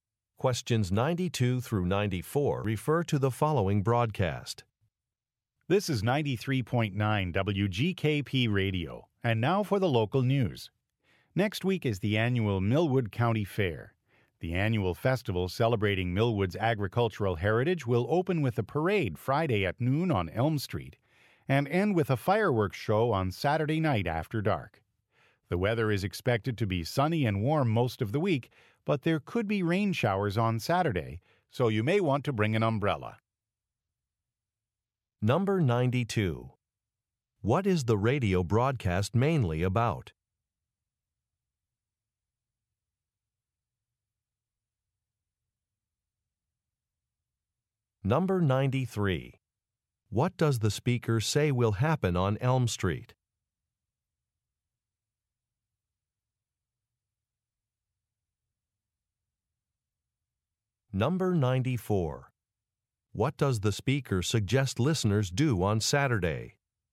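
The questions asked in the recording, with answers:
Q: What is the radio broadcast mainly about?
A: The annual Millwood County Fair

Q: What does the speaker say will happen on Elm Street?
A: A parade will open the fair on Friday at noon

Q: What does the speaker suggest listeners do on Saturday?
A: Bring an umbrella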